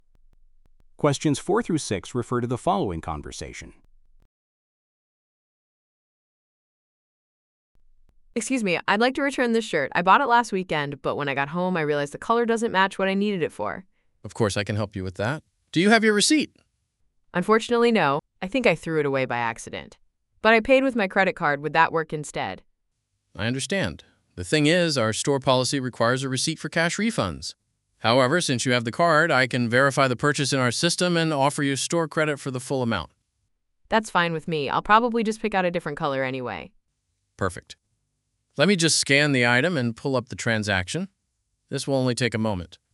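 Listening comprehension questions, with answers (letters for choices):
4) What does the woman want to do?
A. Exchange a gift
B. Return a purchase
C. Report a missing item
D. Apply for a store card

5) What is the problem with the woman's request?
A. She does not have proof of purchase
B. She missed the return deadline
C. The item is damaged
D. She lost her credit card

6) What does the man offer the woman?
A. A full cash refund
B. A replacement shirt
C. Store credit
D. A discount on future purchases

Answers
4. B
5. A
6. C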